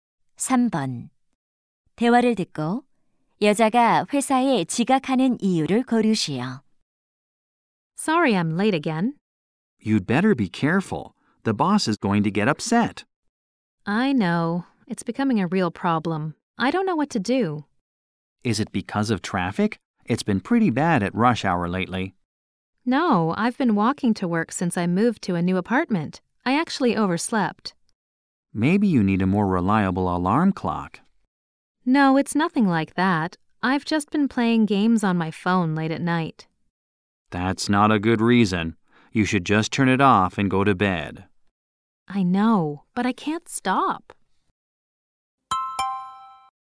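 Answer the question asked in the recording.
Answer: 밤늦게까지 휴대폰 게임을 해서 늦잠을 자서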